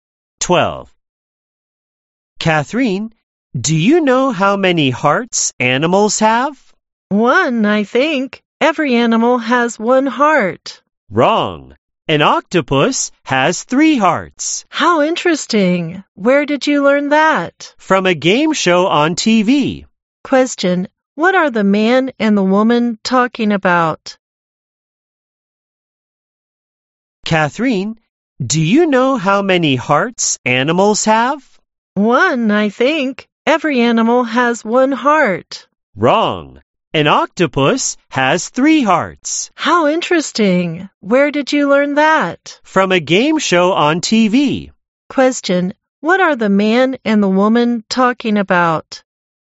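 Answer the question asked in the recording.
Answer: How many hearts animals have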